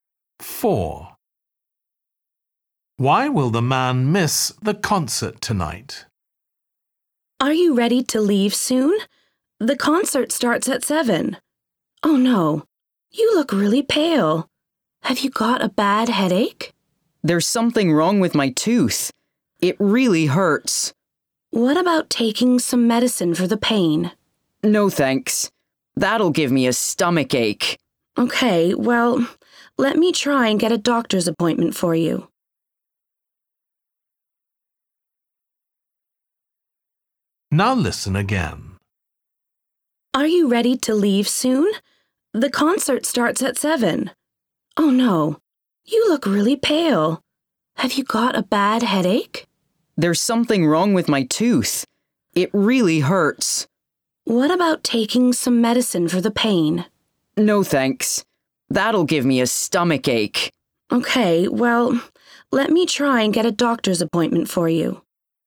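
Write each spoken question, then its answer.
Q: Why will the man miss the concert tonight?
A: He has toothache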